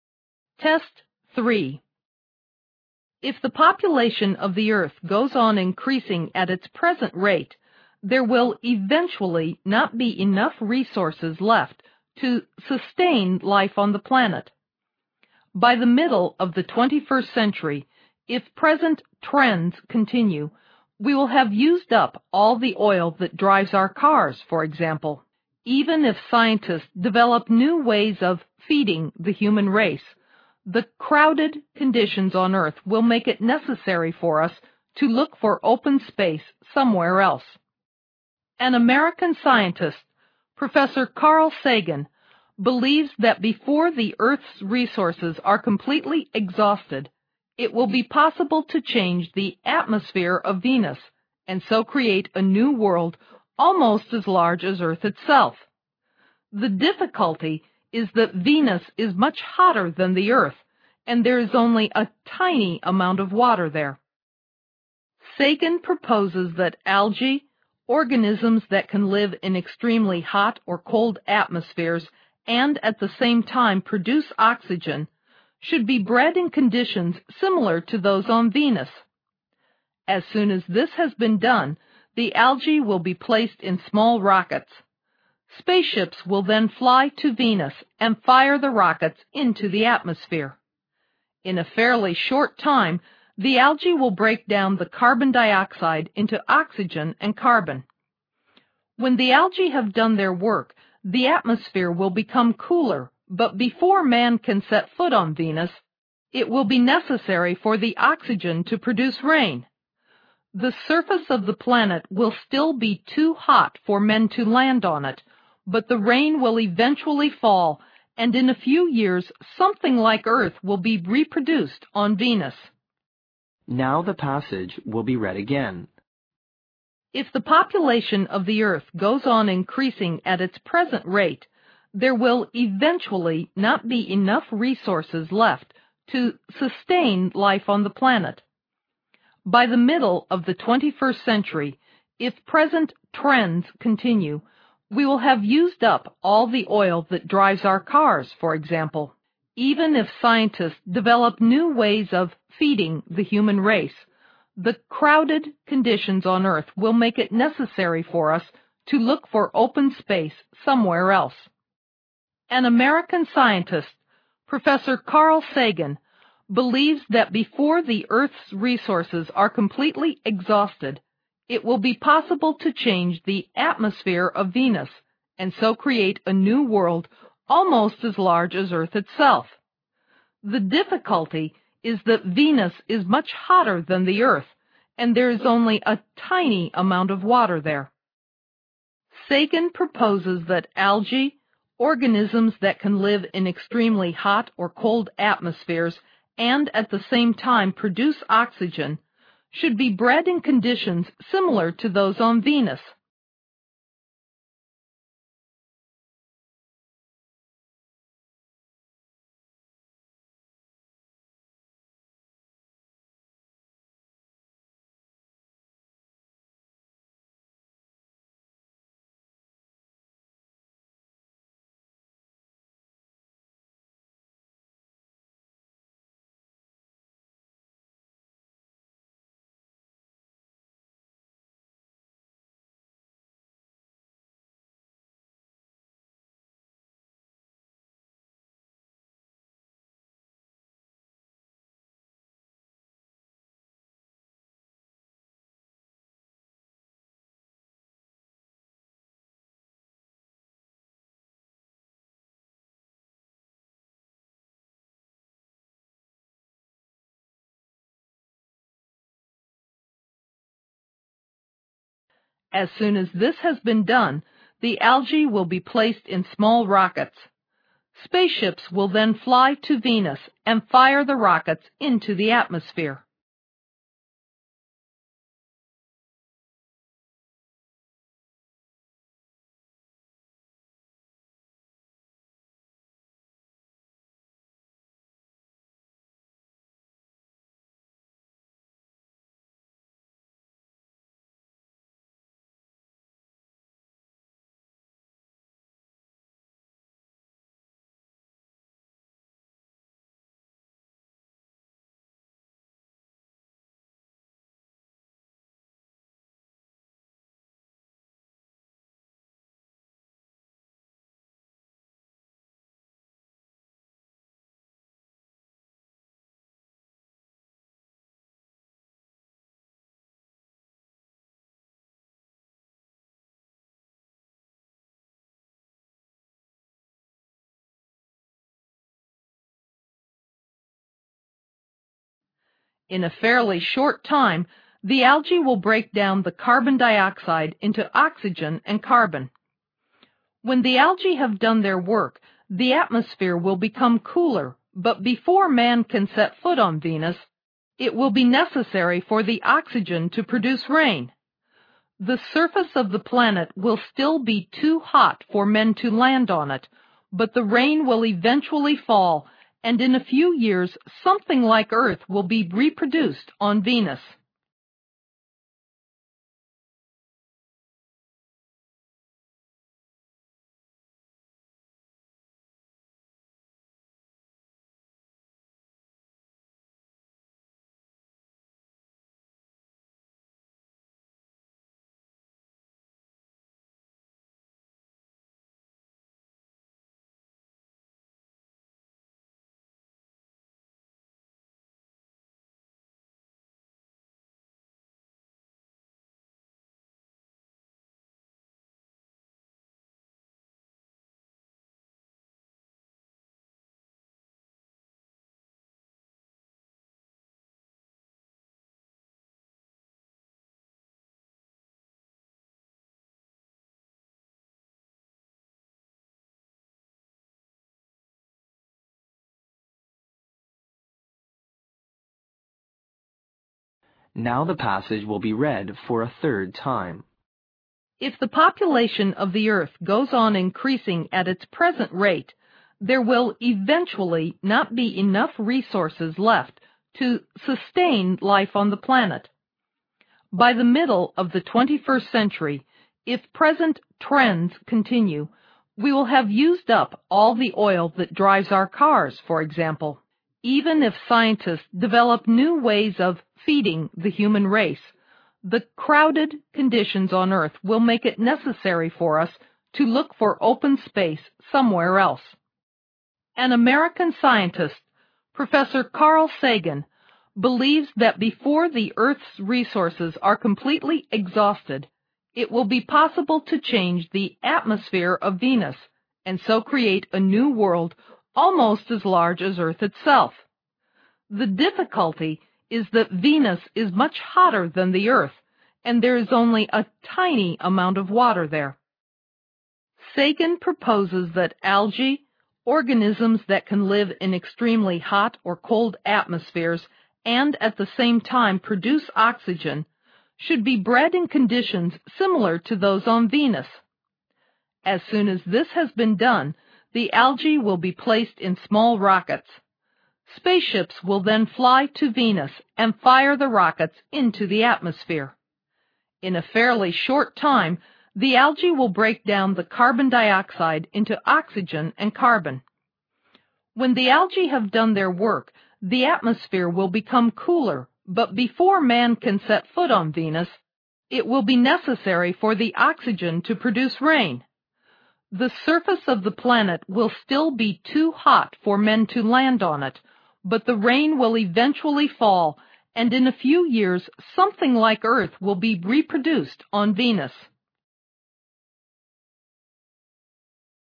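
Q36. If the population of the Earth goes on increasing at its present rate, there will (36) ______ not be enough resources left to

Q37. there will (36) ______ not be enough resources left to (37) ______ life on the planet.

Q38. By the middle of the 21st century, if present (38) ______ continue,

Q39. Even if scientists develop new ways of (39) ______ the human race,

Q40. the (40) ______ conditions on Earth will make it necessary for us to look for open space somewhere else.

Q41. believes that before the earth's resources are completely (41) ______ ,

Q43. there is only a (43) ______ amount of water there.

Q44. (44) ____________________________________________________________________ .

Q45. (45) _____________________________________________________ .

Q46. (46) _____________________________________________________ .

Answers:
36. eventually
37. sustain
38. trends
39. feeding
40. crowded
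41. exhausted
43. tiny
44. Sagan proposes that algae, organisms that can live in extremely hot or cold atmospheres and at the same time produce oxygen, should be bred in conditions similar to those on Venus
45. Spaceships will then fly to Venus and fire the rockets into the atmosphere
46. The surface of the planet will still be too hot for men to land on it, but the rain will eventually fall, and in a few years, something like Earth will be reproduced on Venus

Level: 六级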